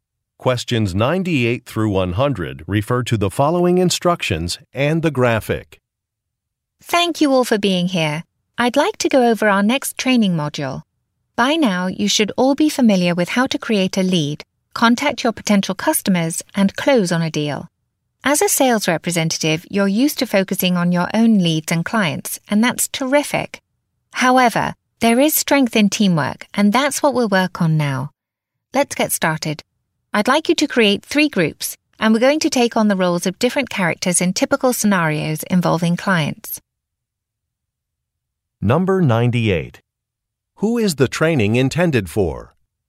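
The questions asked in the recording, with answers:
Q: Who is the training intended for?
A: Sales representatives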